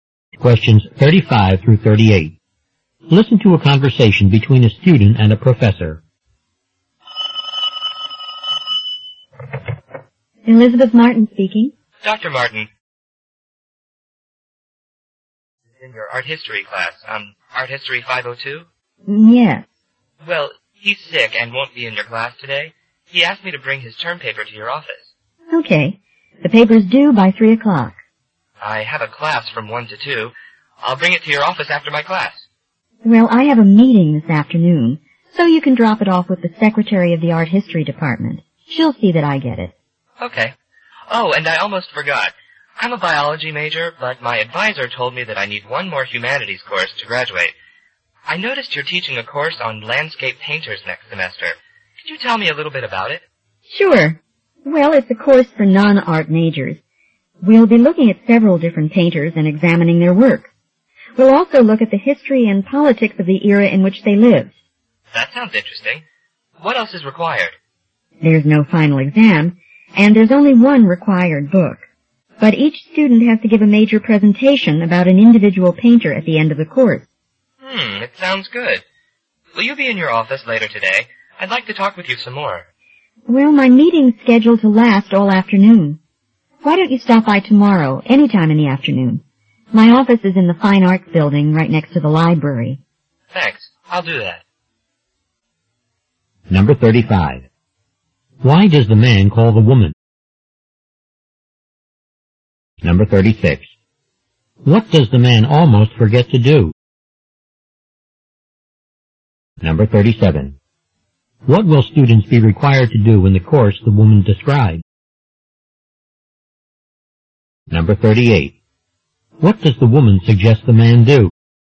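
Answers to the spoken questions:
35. To say that his friend is sick and that he will bring in the friend's term paper
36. Ask about her landscape painters course
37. Give a major presentation about a painter
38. Come by her office tomorrow afternoon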